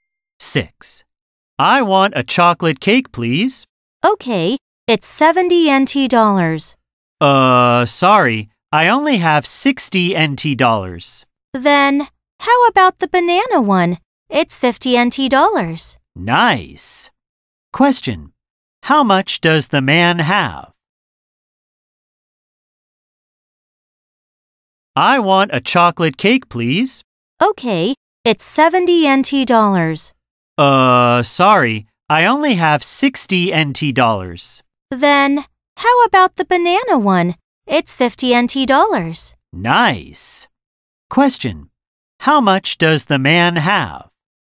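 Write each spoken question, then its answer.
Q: How much does the man have?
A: 60 NT dollars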